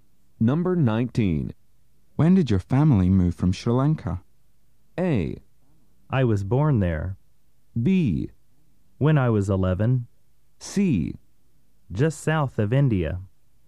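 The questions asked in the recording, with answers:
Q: When did your family move from Sri Lanka?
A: B: When I was 11.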